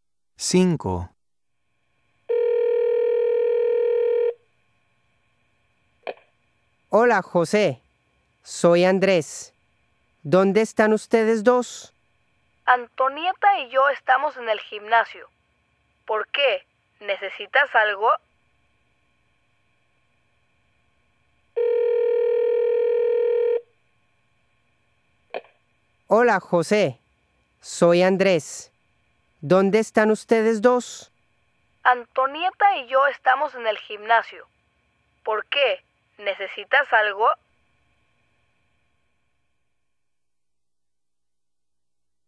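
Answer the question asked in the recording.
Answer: En el gimnasio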